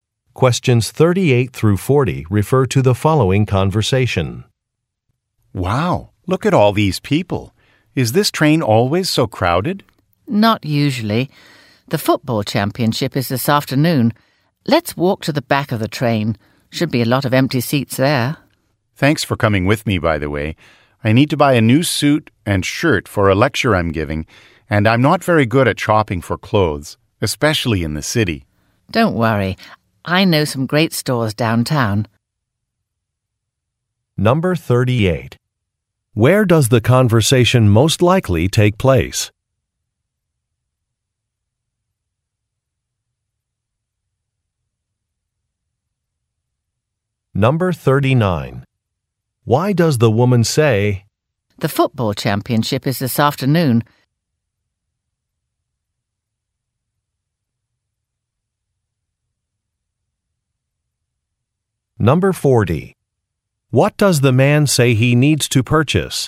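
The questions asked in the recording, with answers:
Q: Where does the conversation most likely take place?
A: On a train

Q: Why does the woman say, "The football championship is this afternoon"?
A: To explain why the train is crowded

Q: What does the man say he needs to purchase?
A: A new suit and shirt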